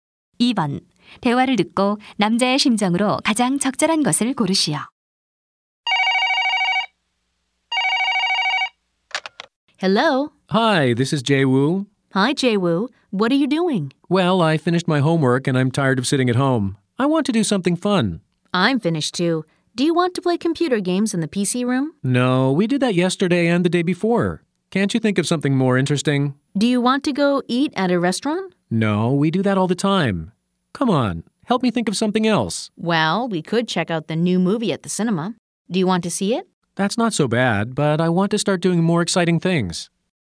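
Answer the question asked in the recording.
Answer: 지루함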